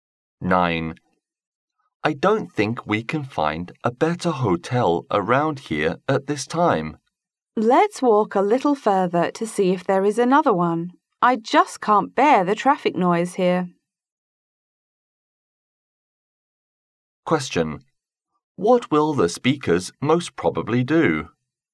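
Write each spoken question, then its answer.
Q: What will the speakers most probably do?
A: Look for another hotel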